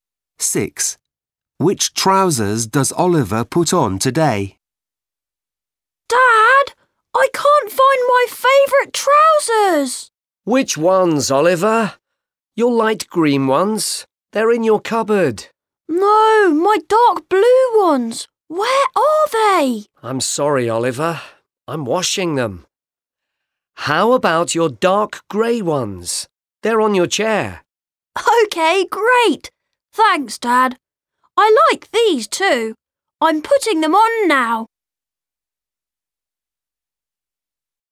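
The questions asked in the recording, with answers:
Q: Which trousers does Oliver put on today?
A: dark grey ones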